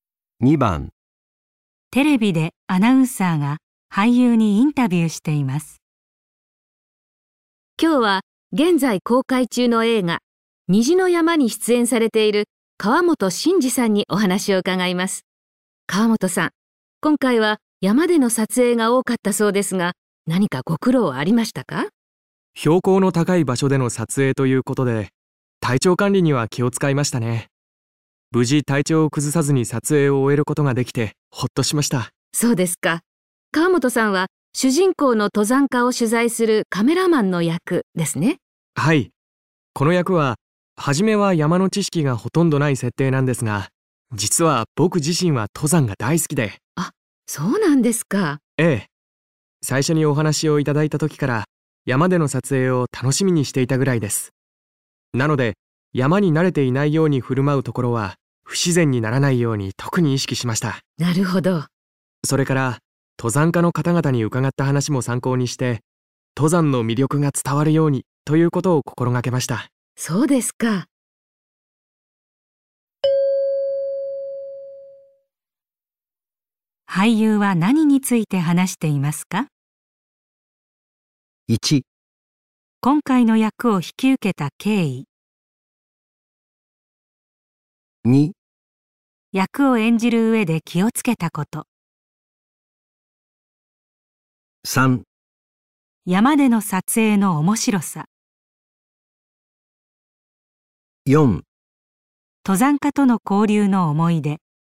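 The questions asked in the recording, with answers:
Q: 俳優は何について話していますか?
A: 2: 役を演じる上で気をつけたこと。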